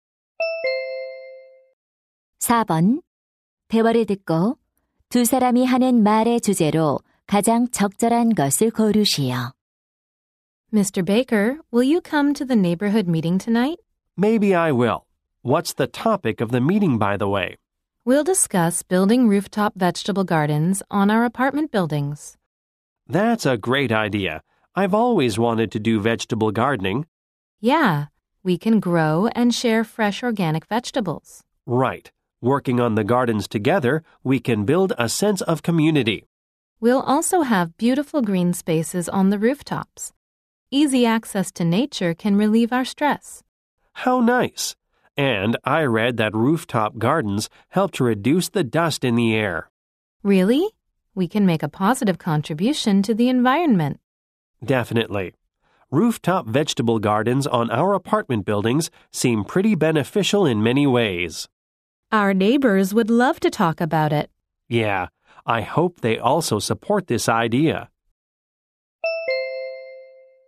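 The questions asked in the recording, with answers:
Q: 대화를 듣고 두 사람이 하는 말의 주제로 가장 적절한 것을 고르시오.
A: 아파트 옥상 텃밭의 이점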